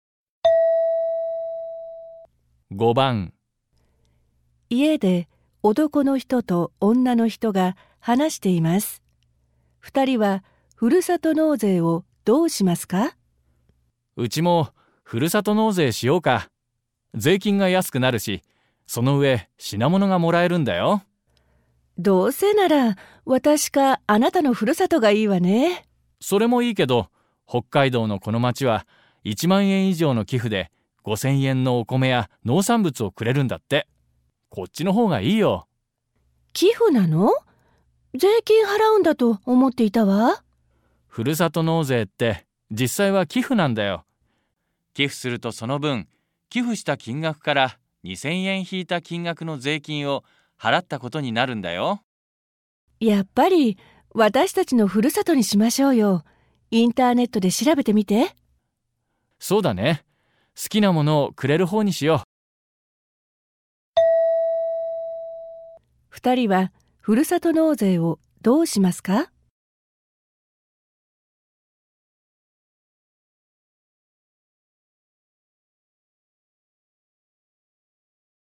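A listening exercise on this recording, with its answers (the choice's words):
問題1では、まず質問を聞いてください。それから話を聞いて、問題用紙の1から4の中から、最もよいものを一つ選んでください。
二人は「ふるさと納税」をどうしますか。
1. 一番高い品物をくれるところにする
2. 一番好きな品物をくれるところに寄付する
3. インターネットでどこかに決める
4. 二人のふるさとのどちらかに寄付する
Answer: 二人のふるさとのどちらかに寄付する

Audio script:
家で男の人と女の人が話しています。二人は「ふるさと納税」をどうしますか。
M:うちもふるさと納税しようか。税金が安くなるし、その上品物がもらえるんだよ。
F:どうせなら、私かあなたのふるさとがいいわね。
M:それもいいけど、北海道のこの町は10,000円以上の寄付で5,000円のお米や農産物をくれるんだって。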